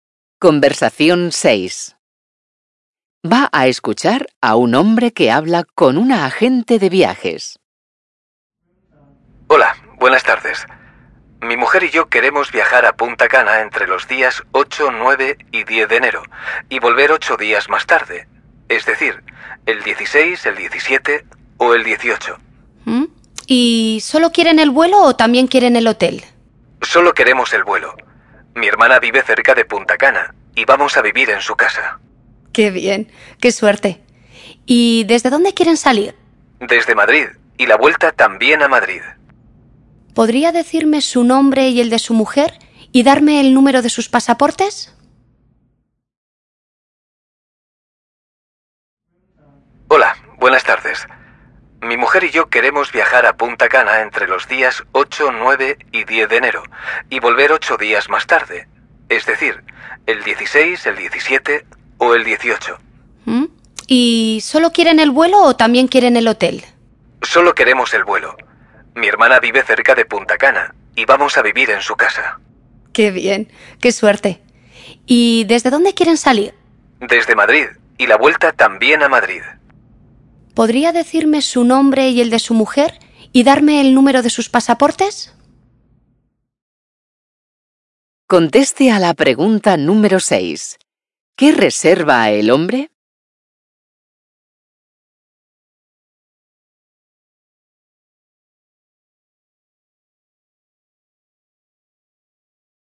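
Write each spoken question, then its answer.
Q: ¿Qué reserva el hombre?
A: Solo el vuelo de ida y vuelta entre Madrid y Punta Cana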